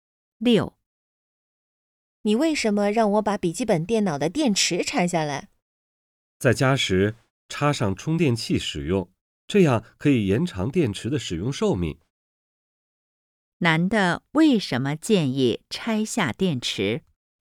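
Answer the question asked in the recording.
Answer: 可以延长电池的使用寿命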